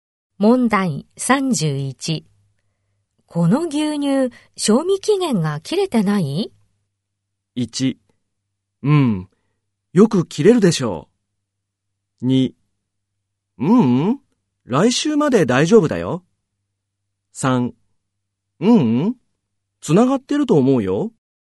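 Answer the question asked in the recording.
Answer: 2: うん、来週まで大丈夫だよ。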